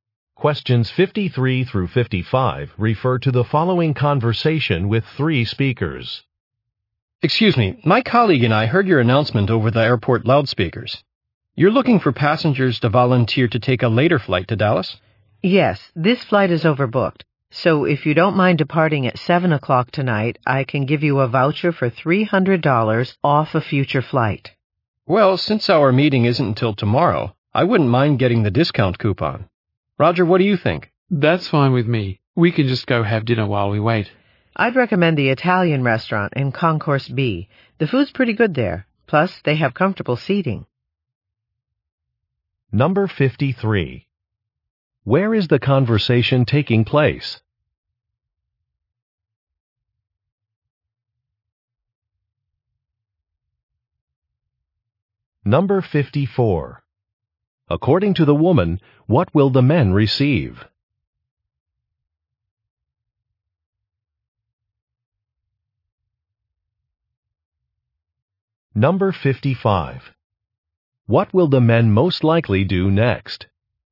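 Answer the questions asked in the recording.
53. At an airport
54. A $300 voucher for a future flight
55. Go have dinner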